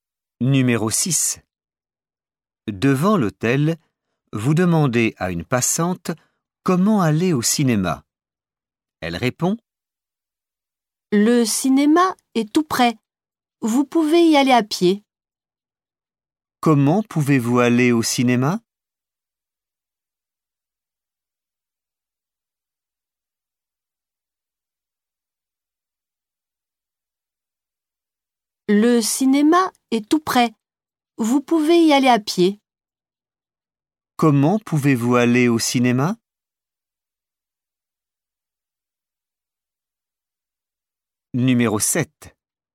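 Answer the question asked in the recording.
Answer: à pied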